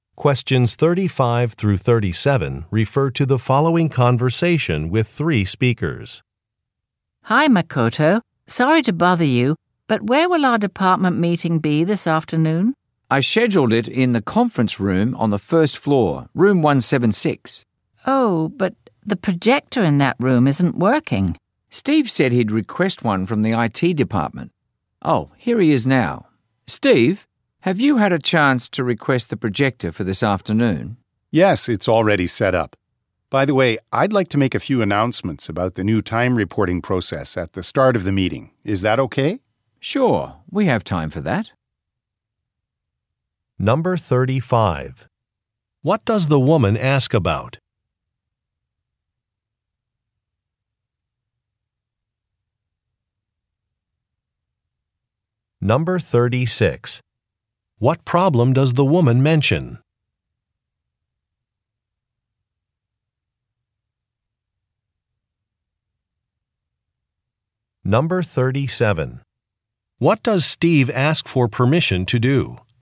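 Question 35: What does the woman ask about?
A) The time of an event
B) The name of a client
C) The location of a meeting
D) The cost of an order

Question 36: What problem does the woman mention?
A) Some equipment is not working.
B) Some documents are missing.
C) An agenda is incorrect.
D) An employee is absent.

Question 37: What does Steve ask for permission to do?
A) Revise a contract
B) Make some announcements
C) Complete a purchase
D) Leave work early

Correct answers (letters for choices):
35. C
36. A
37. B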